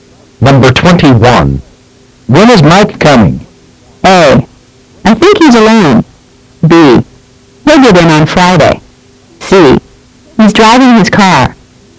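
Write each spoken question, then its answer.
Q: When is Mike coming?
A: B: He'll get in on Friday.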